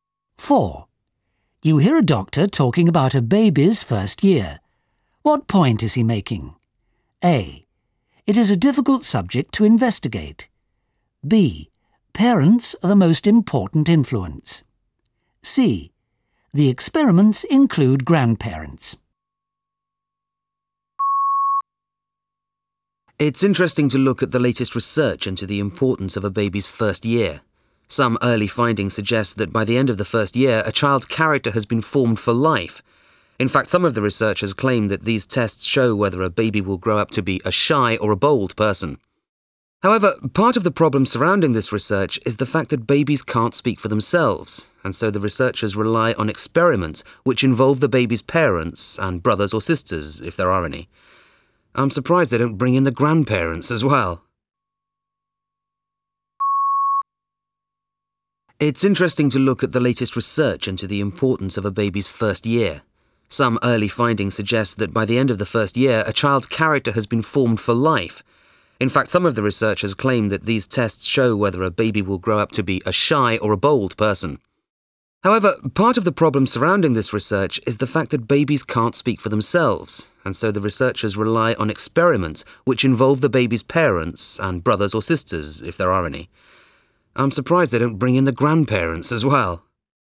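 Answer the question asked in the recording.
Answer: A: It is a difficult subject to investigate.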